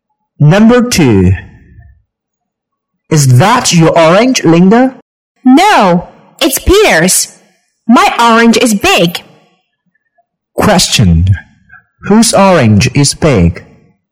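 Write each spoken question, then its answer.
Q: Whose orange is big?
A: Linda's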